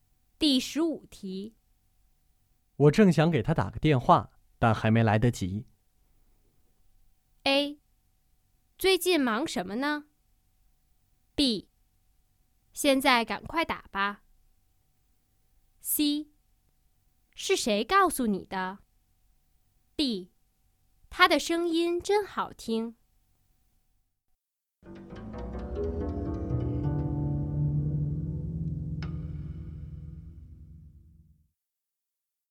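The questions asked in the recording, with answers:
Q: 我正想给他打个电话,但还没来得及。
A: B: 现在赶快打吧。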